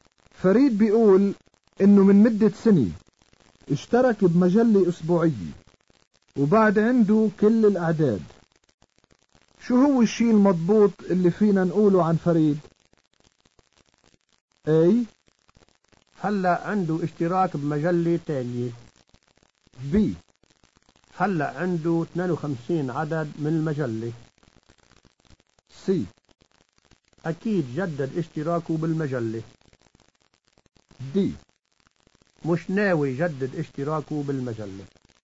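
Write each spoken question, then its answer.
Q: فريد بيقول انه من مدة سنة اشترك بمجلة اسبوعية وبعد عنده كل الاعداد شو هو الشيء المضبوط اللي فينا نقوله عن فريد؟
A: B: هلأ عنده 52 عدد من المجلة.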